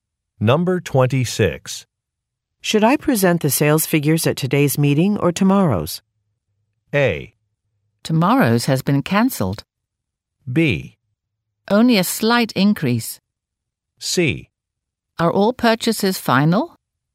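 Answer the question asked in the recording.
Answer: A: Tomorrow's has been cancelled.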